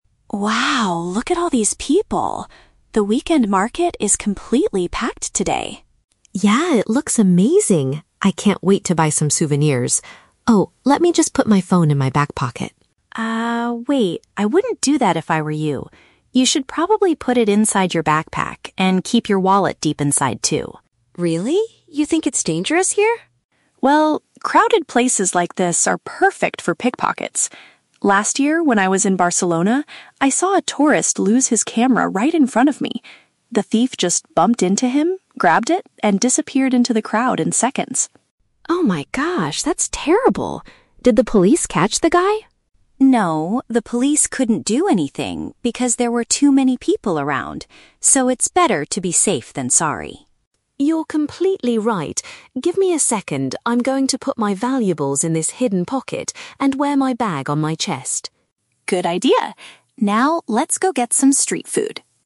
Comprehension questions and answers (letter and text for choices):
Listen to the conversation between two friends at a market and choose the correct answer (A, B, or C) for each question.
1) Why does Sarah tell Anna to change where she keeps her phone?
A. Because she thinks Anna's phone might get stolen.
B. Because she wants Anna to take photos with a camera.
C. Because she thinks the phone will fall out while walking.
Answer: A. Because she thinks Anna's phone might get stolen.

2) What did Sarah witness during her previous trip to Barcelona?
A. A traveler was robbed by a stranger.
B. The police arrested a street thief.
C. She lost her own backpack in the crowd.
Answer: A. A traveler was robbed by a stranger.

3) What does Anna decide to do at the end of the conversation?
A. She decides not to buy any souvenirs today.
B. She goes to buy some street food immediately.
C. She moves her expensive items to a safer place.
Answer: C. She moves her expensive items to a safer place.

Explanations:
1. Sarah warns Anna that the crowded market is "perfect for pickpockets." A pickpocket is a thief who steals things from pockets, meaning the phone might get stolen. The Trap (B): Sarah mentions a "camera" later in the conversation, but she doesn't tell Anna to use one. She only talks about a camera that was stolen. Plausible but not mentioned (C): Dropping a phone from a back pocket is a logical fear, but Sarah's specific warning is about crime (pickpockets), not dropping it.
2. Sarah says, "I saw a tourist lose his camera... The thief just bumped into him, grabbed it". A tourist is a traveler, and a thief taking the camera means the traveler was robbed. The Trap (B): The script mentions the "police", but Sarah clearly says "the police couldn't do anything," meaning they did not arrest the thief. Plausible but not mentioned (C): She mentions Anna's "backpack" earlier, but Sarah never says she lost her own bag in Barcelona; she saw it happen to someone else.
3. Anna says, "I'm going to put my valuables in this hidden pocket." Valuables mean expensive items (like a phone or wallet), and a hidden pocket is a safer place. The Trap (B): Sarah suggests going to get "street food" at the very end, but Anna's action before doing that is securing her bag ("Give me a second..."). Plausible but not mentioned (A): Anna originally wanted to buy souvenirs. Even though she learns about the pickpockets, she does not say she will cancel her shopping plans.

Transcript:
Sarah: Wow, look at all these people! The weekend market is completely packed today.
Anna: Yeah, it looks amazing! I can't wait to buy some souvenirs. Oh, let me just put my phone in my back pocket...
Sarah: Ah, wait, I wouldn't do that if I were you. You should probably put it inside your backpack, and keep your wallet deep inside too.
Anna: Really? You think it's dangerous here?
Sarah: Well, crowded places like this are perfect for pickpockets. Last year, when I was in Barcelona, I saw a tourist lose his camera right in front of me. The thief just bumped into him, grabbed it, and disappeared into the crowd in seconds.
Anna: Oh my gosh, that's terrible! Did the police catch the guy?
Sarah: No, the police couldn't do anything because there were too many people around. So, it's better to be safe than sorry.
Anna: You're completely right. Give me a second, I'm going to put my valuables in this hidden pocket and wear my bag on my chest.